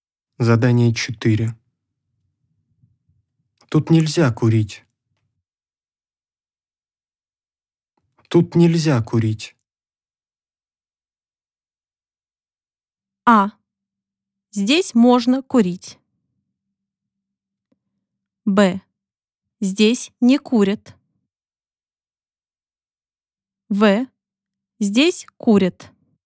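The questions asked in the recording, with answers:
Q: Тут нельзя курить.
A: Б: Здесь не курят.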